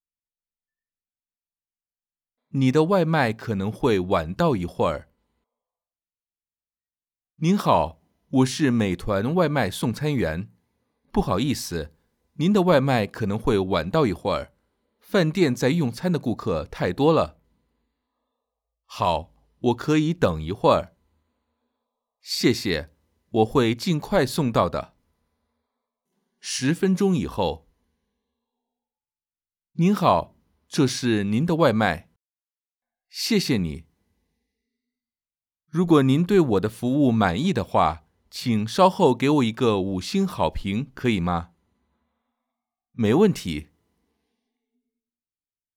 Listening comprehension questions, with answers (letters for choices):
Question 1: 美团外卖是什么?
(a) 送外卖的公司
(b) 送快递的公司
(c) 送花公司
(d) 饭店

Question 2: 送餐员想要什么?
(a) 礼物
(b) 五块钱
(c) 五星好评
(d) 没有提到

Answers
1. a
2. c

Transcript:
送餐员:您好,我是美团外卖送餐员。不好意思,您的外卖可能会晚到一会,饭店在用餐的顾客太多了。
不好意思,您的外卖可能会晚到一会,饭店在用餐的顾客太多了。 我:好,我可以等一会。 送餐员:谢谢,我会尽快送到的。 十分钟以后。 送餐员:您好,这是您的外卖。 我:谢谢你。 送餐员:如果您对我的服务满意的话,请稍后给我一个五星好评可以吗? 我:没问题!